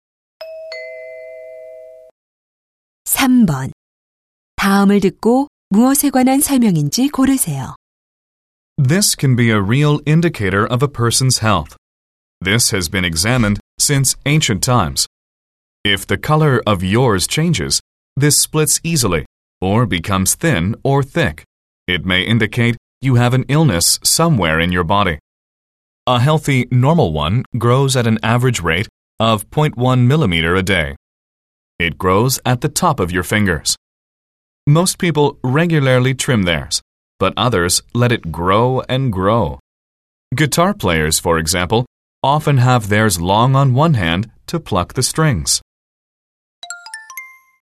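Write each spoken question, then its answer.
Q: 다음을 듣고 무엇에 관한 설명인지 고르세요.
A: 손톱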